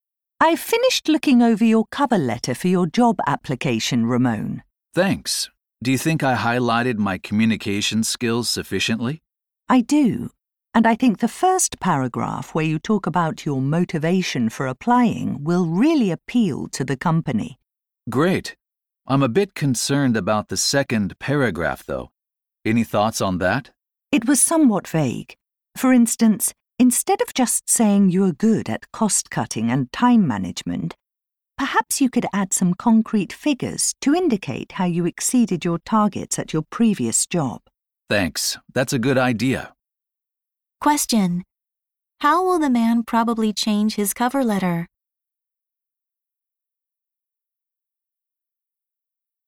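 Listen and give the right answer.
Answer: By adding concrete figures showing how he exceeded his targets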